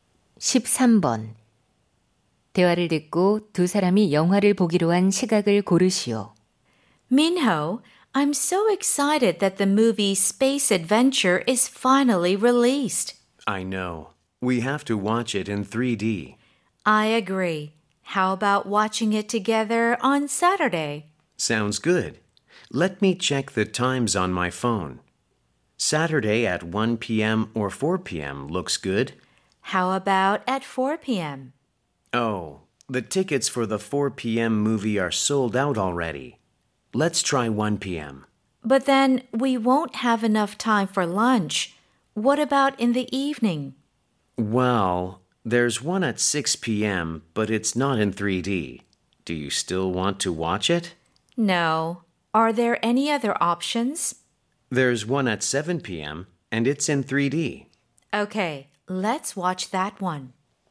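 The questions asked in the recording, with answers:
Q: 대화를 듣고 두 사람이 영화를 보기로 한 시각을 고르시오.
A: 오후 7시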